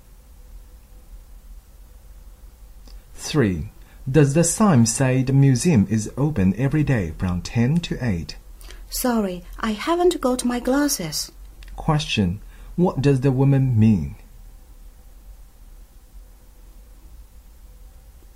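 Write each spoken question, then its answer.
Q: What does the woman mean?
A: She can't read the sign without her glasses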